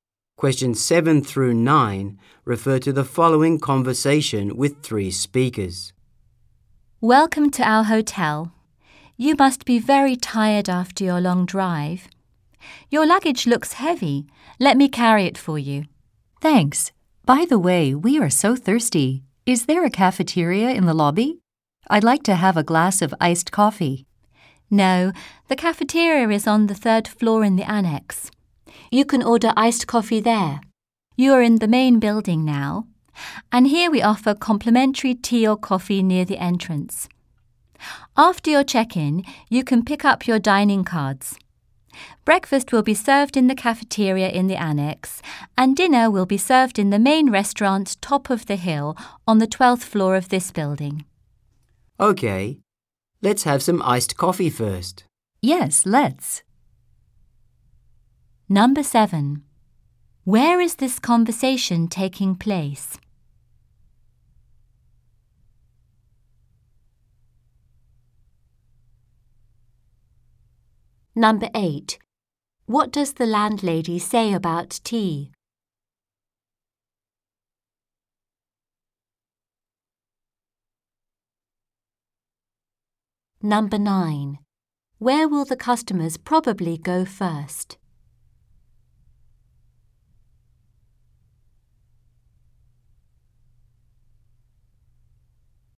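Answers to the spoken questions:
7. At a hotel (in the lobby of the main building)
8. It is complimentary (free) near the entrance
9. To the cafeteria on the third floor of the annex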